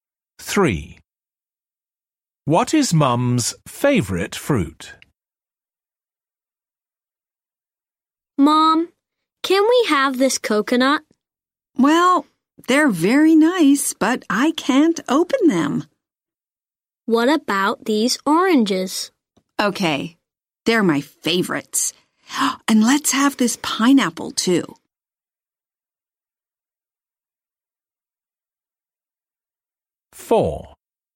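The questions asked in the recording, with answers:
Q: What is Mum's favourite fruit?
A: Oranges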